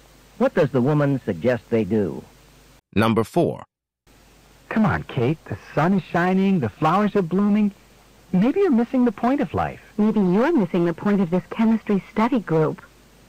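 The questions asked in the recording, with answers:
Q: What does the woman mean?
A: They should focus on studying chemistry instead of enjoying the weather.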